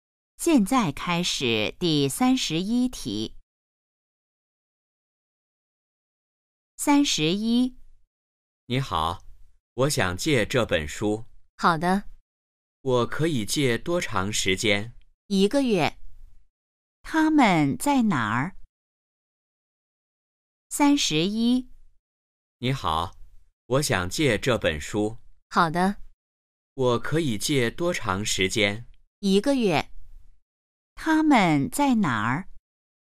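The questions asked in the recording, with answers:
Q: 他们在哪儿?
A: 图书馆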